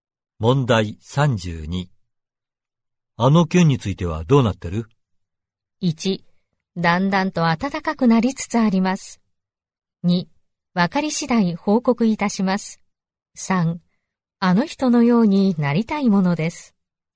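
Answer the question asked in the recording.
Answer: 2: わかり次第報告いたします。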